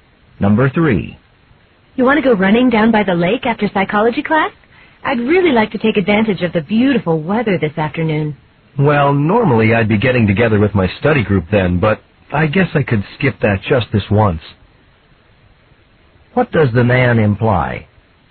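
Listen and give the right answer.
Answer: He will skip his study group and go running.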